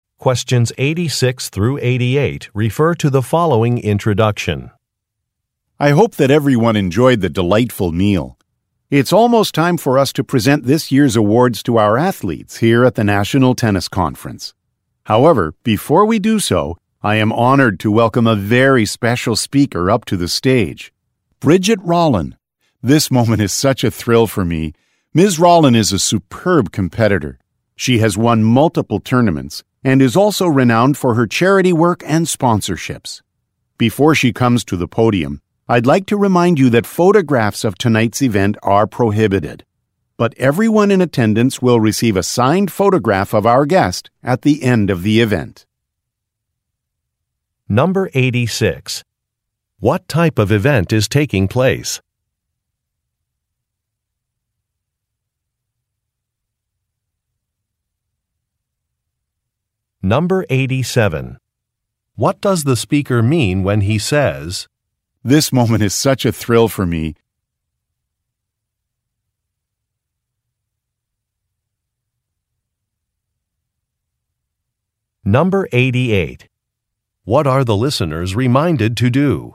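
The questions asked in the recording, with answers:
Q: What type of event is taking place?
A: An awards ceremony (dinner) at a tennis conference

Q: What are the listeners reminded to do?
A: Not to take photographs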